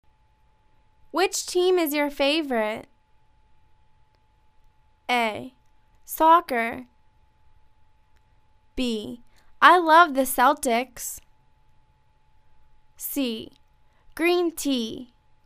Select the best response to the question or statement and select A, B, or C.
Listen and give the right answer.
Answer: I love the Celtics